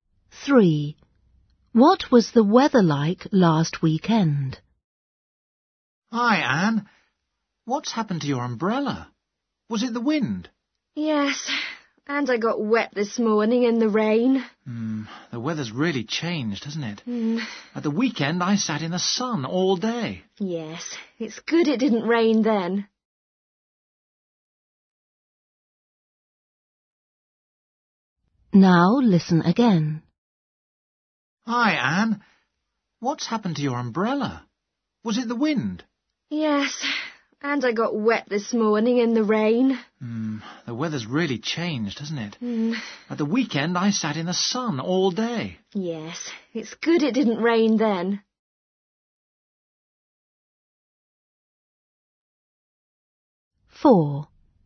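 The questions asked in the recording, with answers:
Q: What was the weather like last weekend?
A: sunny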